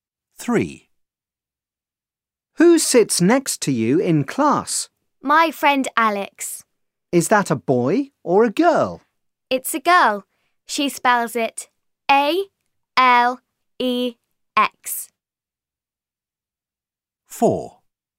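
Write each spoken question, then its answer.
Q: Who sits next to you in class?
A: Alex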